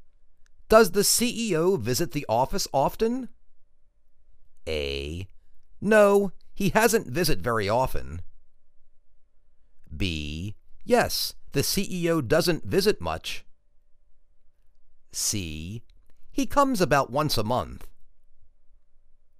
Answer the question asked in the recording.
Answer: He comes about once a month.